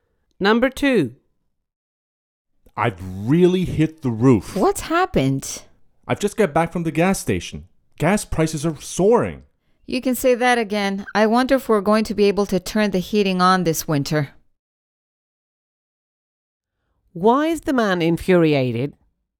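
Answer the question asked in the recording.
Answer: Gas prices are soaring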